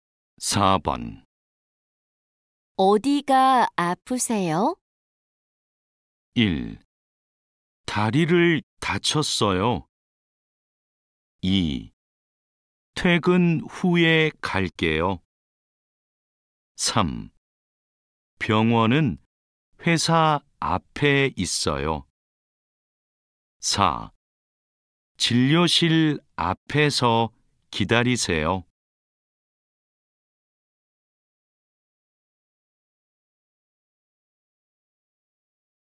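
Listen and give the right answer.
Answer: 1: 다리를 다쳤어요.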